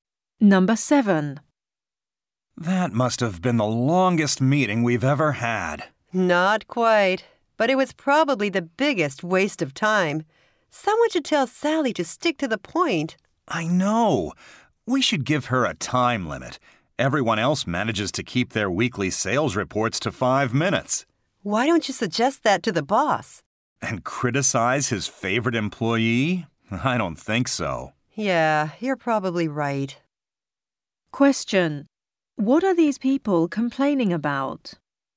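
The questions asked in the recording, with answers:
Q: What are these people complaining about?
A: Sally's long sales reports in meetings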